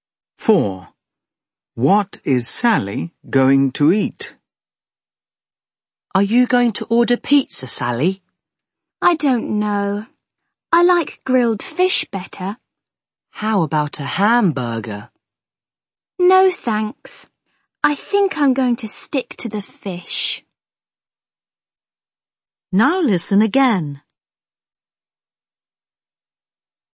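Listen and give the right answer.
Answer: grilled fish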